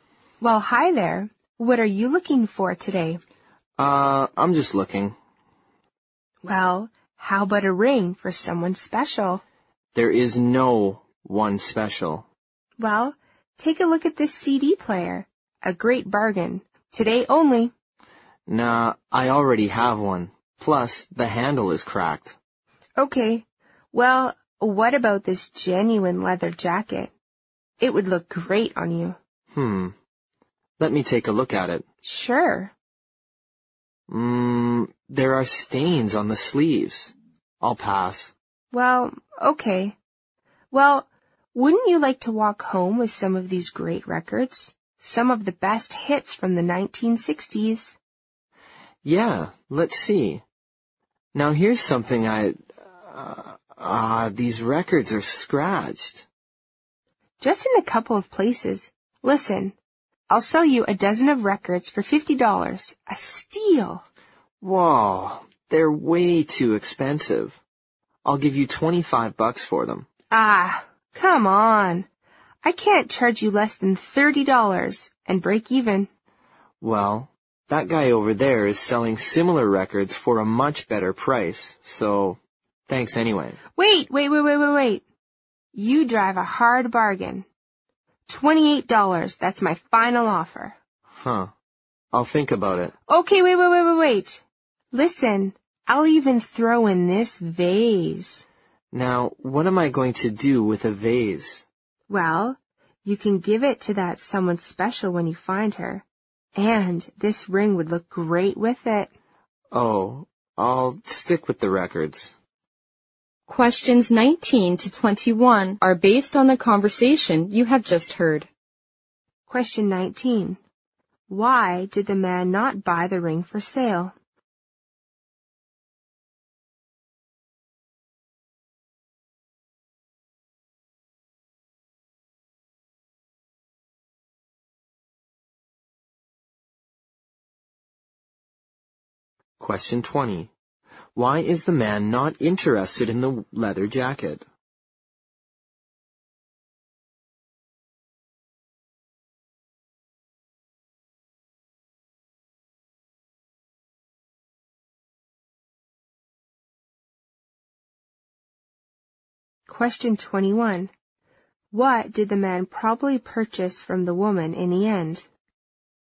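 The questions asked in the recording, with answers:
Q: Why did the man not buy the ring for sale?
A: He has no one special to give it to.

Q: Why is the man not interested in the leather jacket?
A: There are stains on the sleeves.

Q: What did the man probably purchase from the woman in the end?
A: The records.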